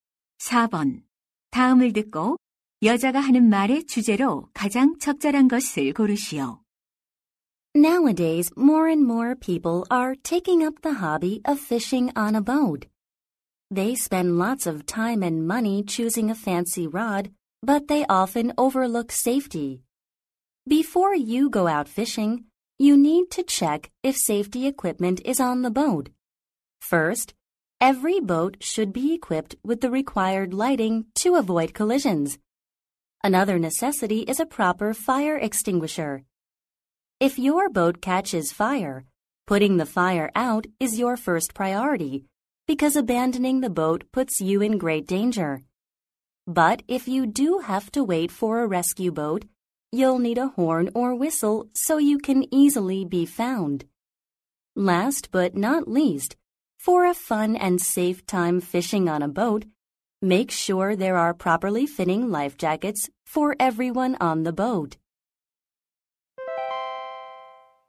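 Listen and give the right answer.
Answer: 보트 낚시 시 필요한 안전 장비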